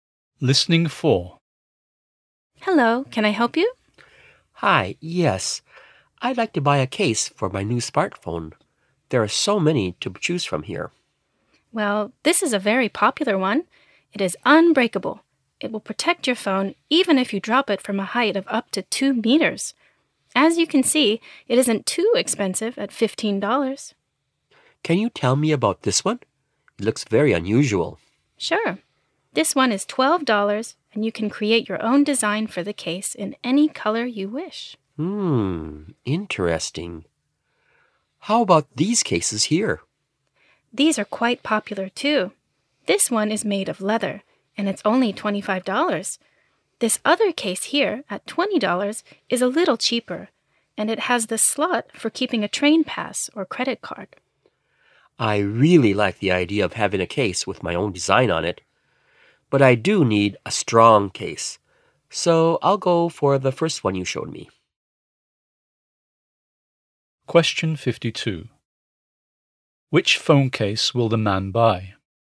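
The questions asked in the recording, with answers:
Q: Which phone case will the man buy?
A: The unbreakable $15 case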